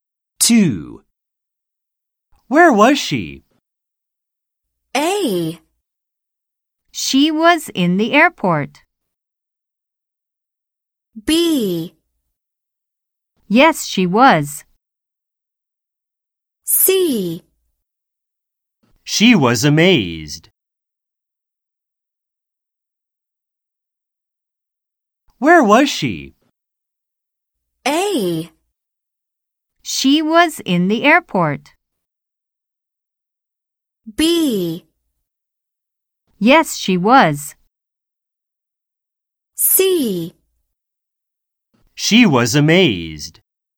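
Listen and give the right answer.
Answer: A: She was in the airport.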